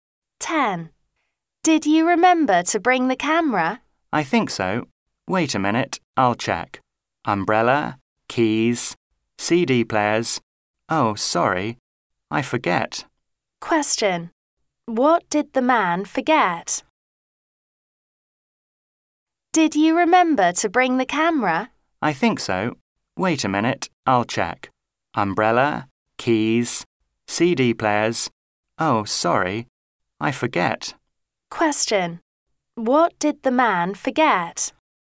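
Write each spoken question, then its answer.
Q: Question. What did the man forget?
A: The camera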